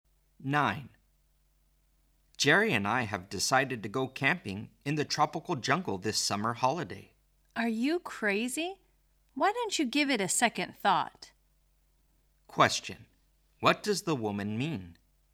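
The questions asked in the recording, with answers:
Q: What does the woman mean?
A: The man should reconsider; camping in the jungle is a bad idea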